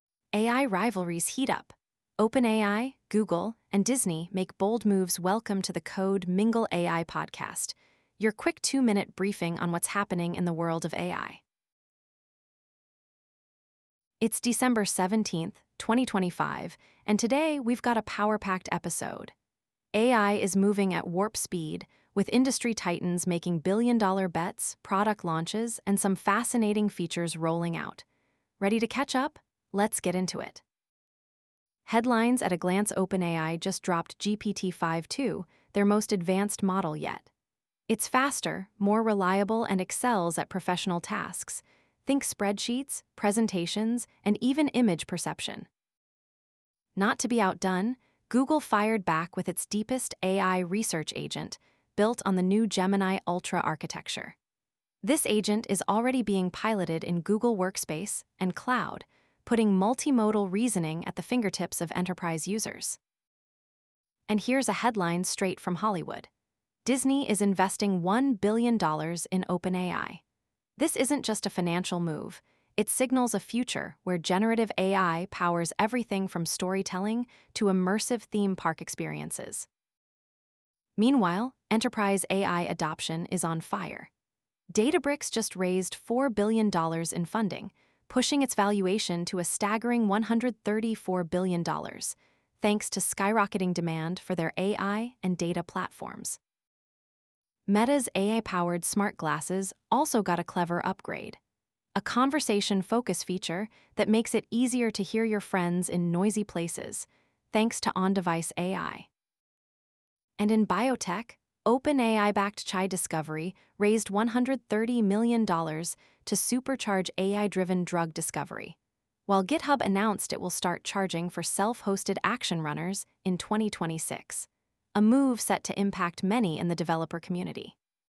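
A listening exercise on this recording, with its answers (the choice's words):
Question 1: What was a key feature of OpenAI's newly launched GPT-5.2 model?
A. Enhanced gaming capabilities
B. Improved performance on professional tasks and faster outputs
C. Integration with autonomous vehicles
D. Focus on social media content moderation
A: Improved performance on professional tasks and faster outputs

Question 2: How did Google respond to OpenAI's release of GPT-5.2?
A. By acquiring Databricks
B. By launching its deepest AI research agent leveraging Gemini Ultra architecture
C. By investing in Disney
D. By releasing a new AI-powered smartphone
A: By launching its deepest AI research agent leveraging Gemini Ultra architecture

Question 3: What is the significance of Disney's $1 billion investment in OpenAI?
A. It marks Disney's entry into the cloud computing market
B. It signals deeper integration of generative AI into entertainment and content creation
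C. It funds the development of a new theme park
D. It supports Meta's wearable technology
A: It signals deeper integration of generative AI into entertainment and content creation

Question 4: Which company raised $4 billion at a $134 billion valuation, highlighting rapid enterprise AI adoption?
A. Meta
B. GitHub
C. Databricks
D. Disney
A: Databricks

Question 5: What new feature did Meta add to its AI-powered smart glasses?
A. Augmented reality gaming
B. Conversation focus mode to amplify voices in noisy environments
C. Fitness tracking capabilities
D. Real-time translation for written text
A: Conversation focus mode to amplify voices in noisy environments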